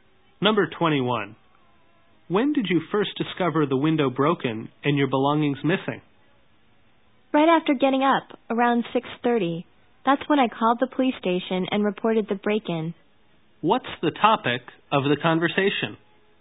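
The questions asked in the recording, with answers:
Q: What's the topic of the conversation?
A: A break-in (burglary)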